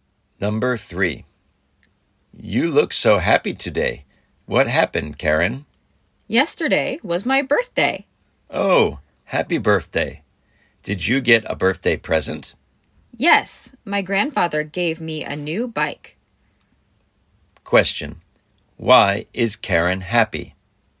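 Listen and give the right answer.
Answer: Her grandfather gave her a new bike for her birthday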